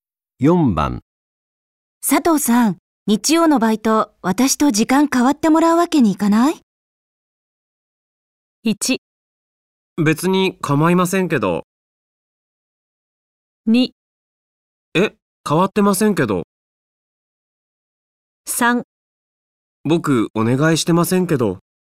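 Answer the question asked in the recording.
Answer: 1: 別に構いませんけど。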